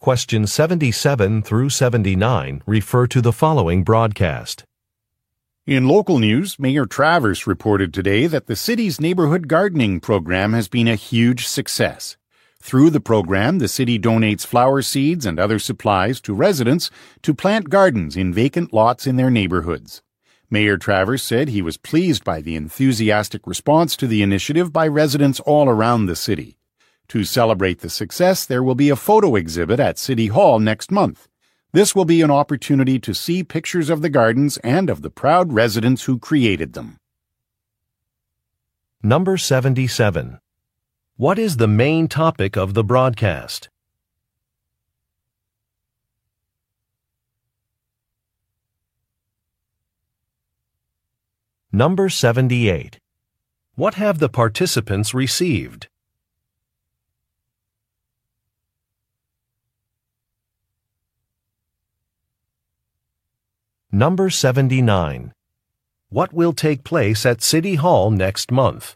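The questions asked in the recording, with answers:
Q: What is the main topic of the broadcast?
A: The success of the city's neighborhood gardening program

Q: What have the participants received?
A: Flower seeds and other gardening supplies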